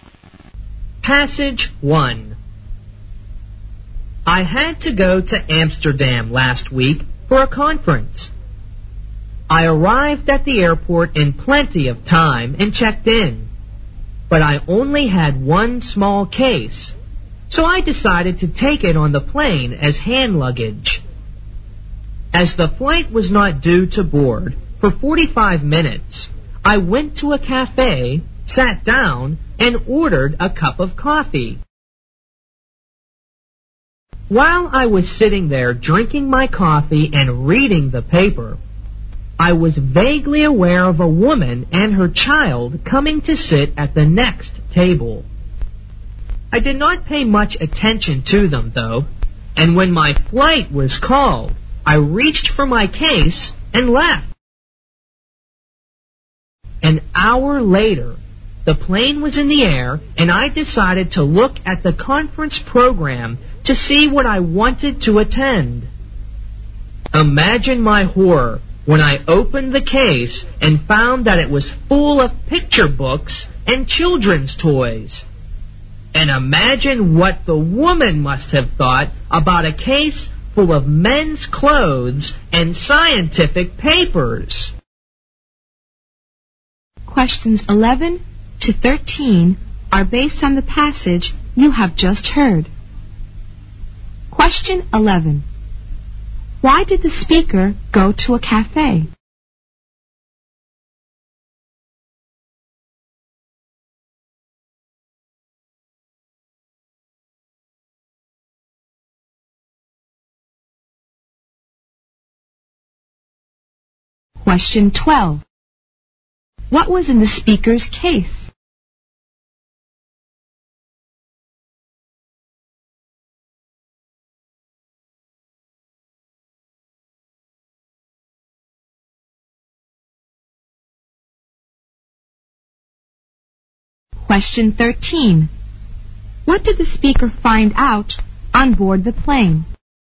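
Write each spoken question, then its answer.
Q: Why did the speaker go to a cafe?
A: He had 45 minutes before boarding

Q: What was in the speaker's case?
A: Men's clothes and scientific papers

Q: What did the speaker find out on board the plane?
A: He had taken the wrong case, full of picture books and children's toys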